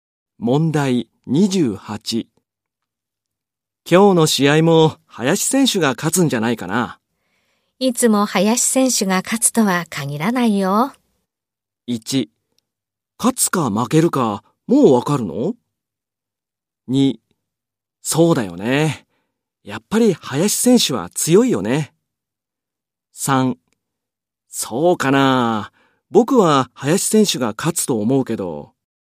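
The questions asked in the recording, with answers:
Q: いつも林選手が勝つとは限らないよ。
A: 3: そうかな。僕は林選手が勝つと思うけど。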